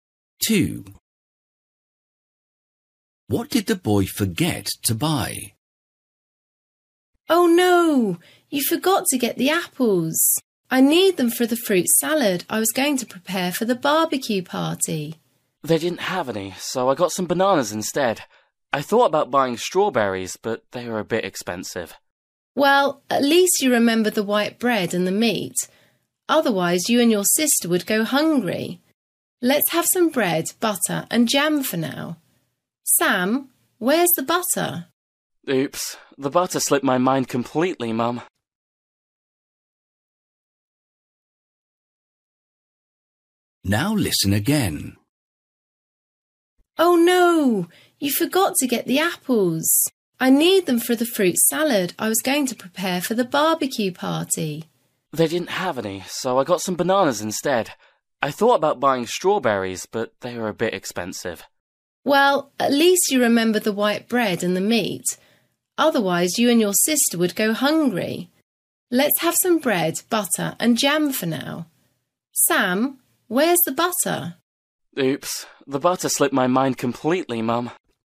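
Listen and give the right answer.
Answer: Butter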